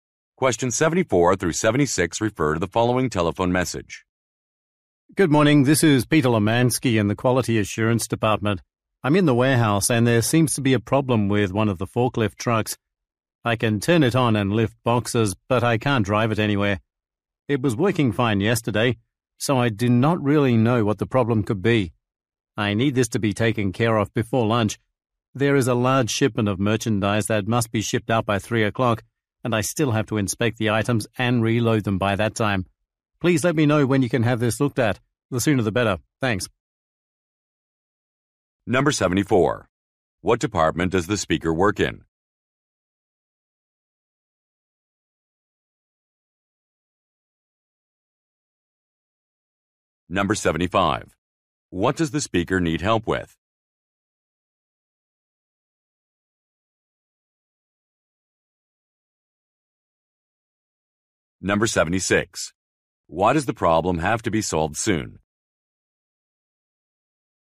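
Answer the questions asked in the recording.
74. Quality Assurance
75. A forklift truck that won't drive
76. A large shipment must go out by 3 o'clock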